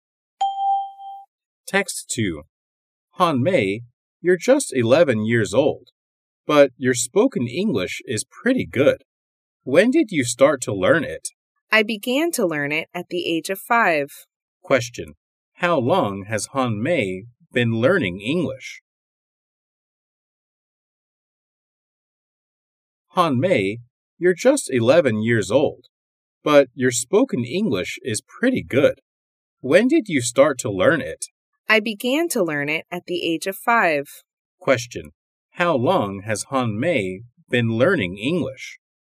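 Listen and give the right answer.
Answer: For 6 years.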